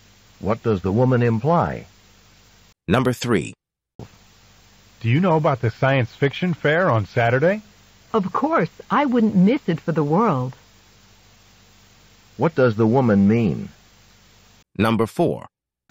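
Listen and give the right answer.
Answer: She will definitely go to the science fiction fair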